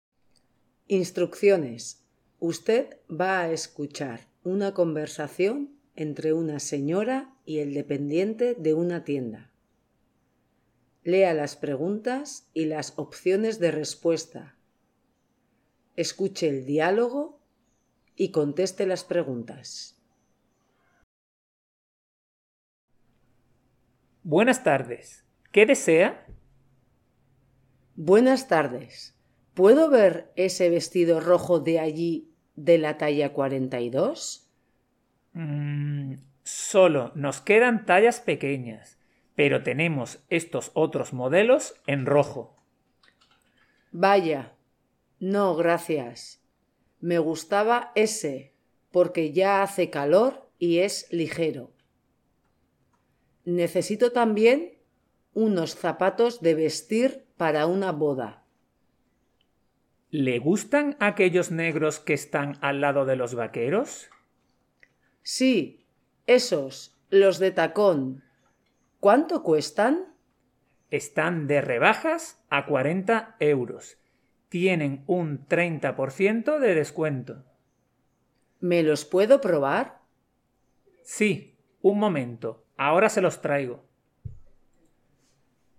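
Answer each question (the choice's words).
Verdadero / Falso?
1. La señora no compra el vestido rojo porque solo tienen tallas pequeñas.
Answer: Verdadero

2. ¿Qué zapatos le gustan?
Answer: Los negros de tacón

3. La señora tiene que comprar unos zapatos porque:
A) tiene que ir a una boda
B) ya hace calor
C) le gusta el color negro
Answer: tiene que ir a una boda

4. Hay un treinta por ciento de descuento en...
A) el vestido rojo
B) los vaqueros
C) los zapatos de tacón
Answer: los zapatos de tacón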